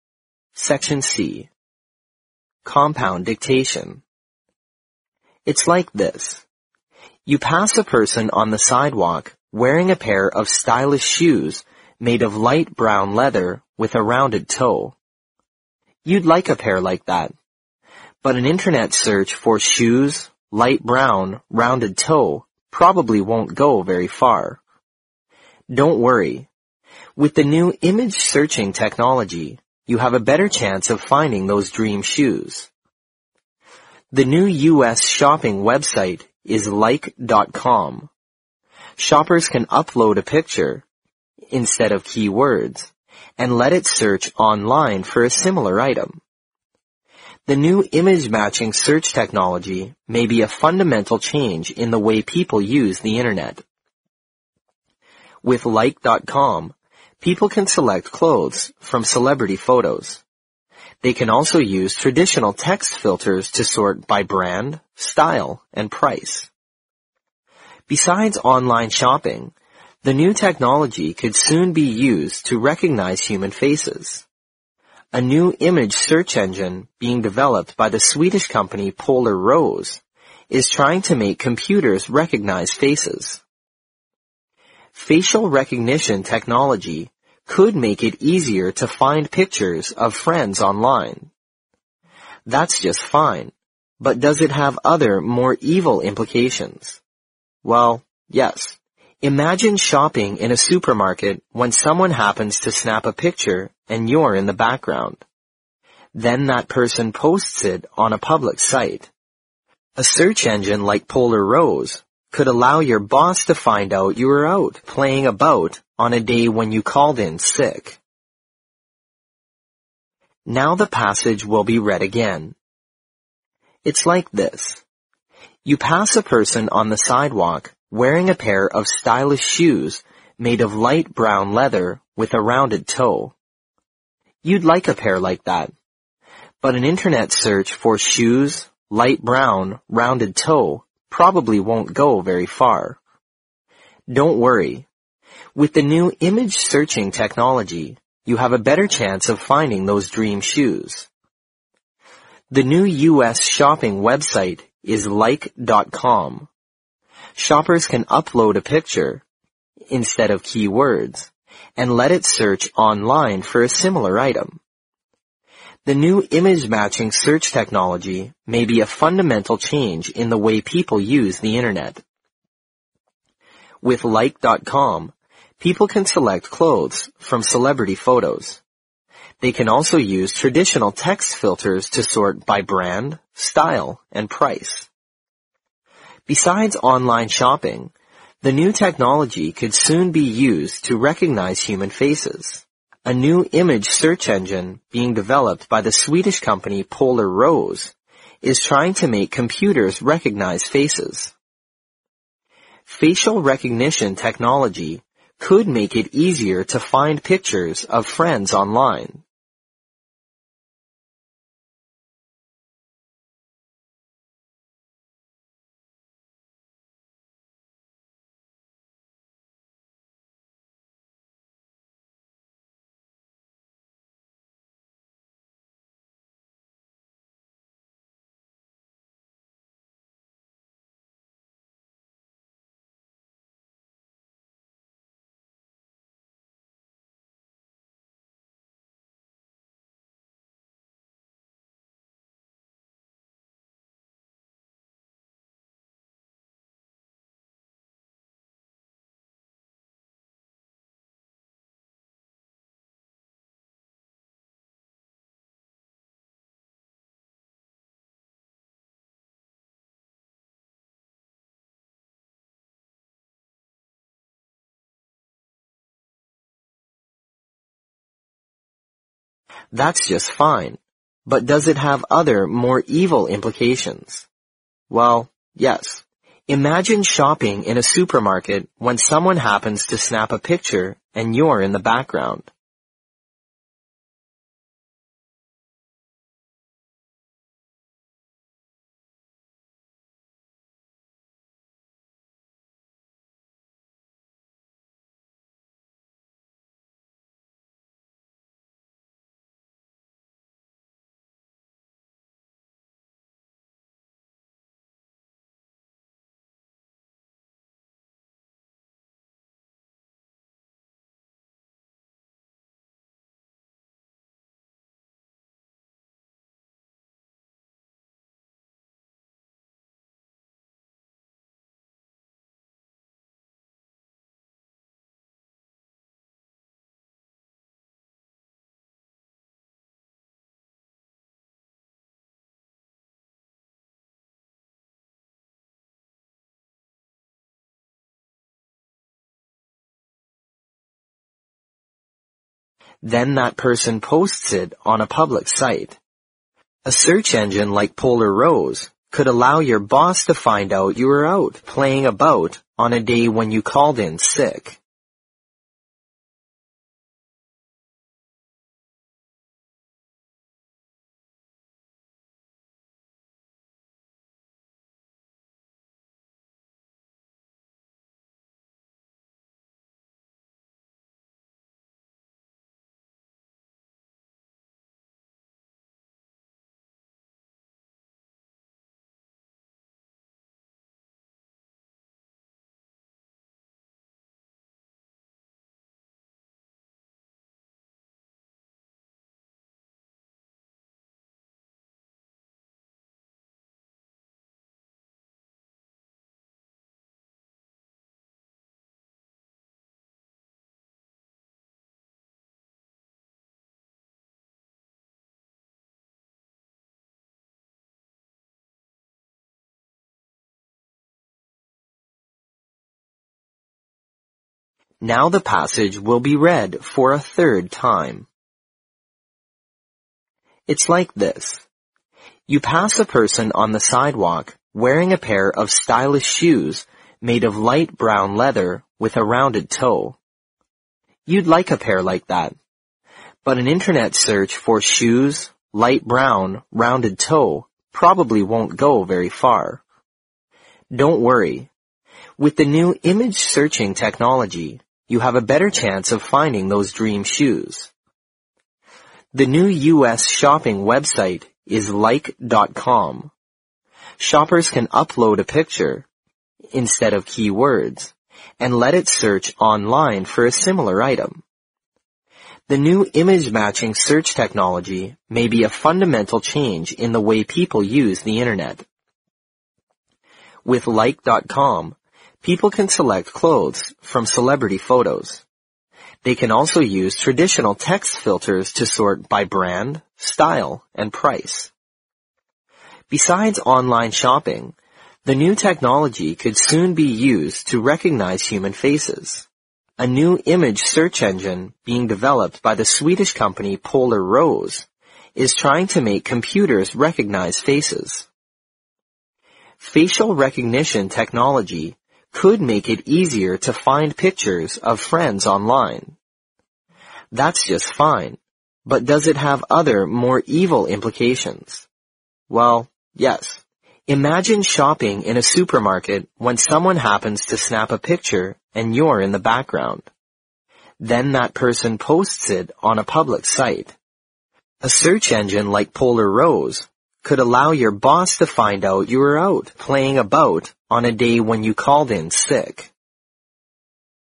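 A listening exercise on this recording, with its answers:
Compound Dictation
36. You pass a person on the sidewalk (36) ______ a pair of stylish shoes made of light brown leather, with a rounded toe.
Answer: wearing

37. With the new image-searching technology, you have a better (37) ______ of finding those dream shoes.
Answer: chance

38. Shoppers can (38) ______ a picture, instead of keywords, and let it search online for a similar (39) ______ .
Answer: upload

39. Shoppers can (38) ______ a picture, instead of keywords, and let it search online for a similar (39) ______ .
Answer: item

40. The new image-mapping search technology may be a (40) ______ change in the way people use the Internet.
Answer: fundamental

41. With like.com, people can (41) ______ clothes from celebrity photos.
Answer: select

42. They can also use (42) ______ text filters to sort by brand, style and price.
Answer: traditional

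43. A new image search engine being (43) ______ by the Swedish company Polar Rose is trying to make computers recognize faces.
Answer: developed

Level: 四级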